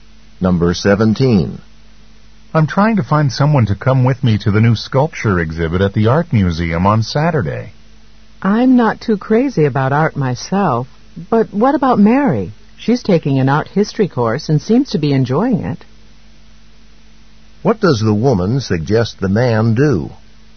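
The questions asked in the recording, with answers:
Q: What does the woman suggest the man do?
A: Ask Mary to go to the exhibit with him.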